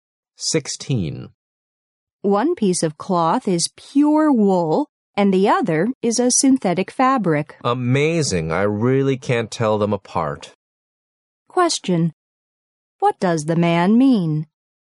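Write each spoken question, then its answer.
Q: What does the man mean?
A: He can't tell the two fabrics apart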